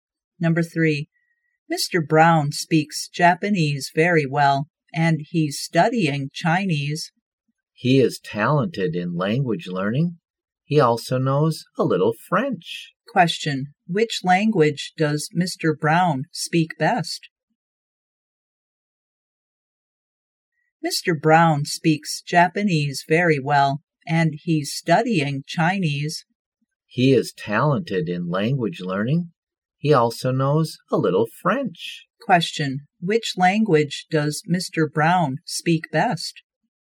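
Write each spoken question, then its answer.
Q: which language does Mr. Brown speak best?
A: Japanese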